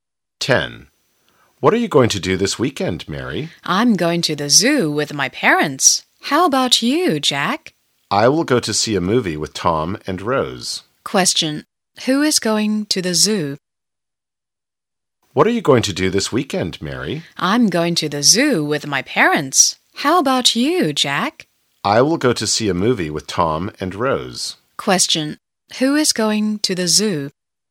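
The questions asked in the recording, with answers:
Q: Who is going to the zoo?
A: Mary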